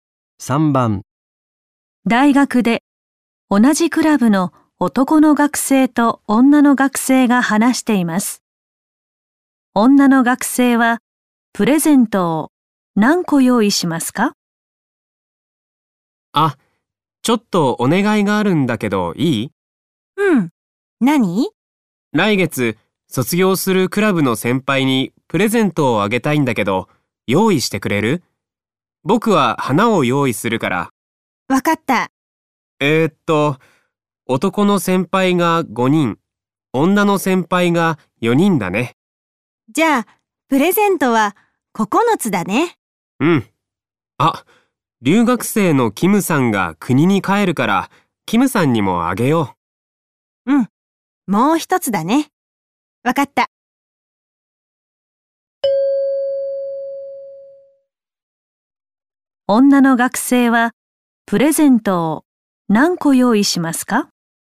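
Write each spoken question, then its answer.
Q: 女の学生はプレゼントを何個用意しますか?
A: 10個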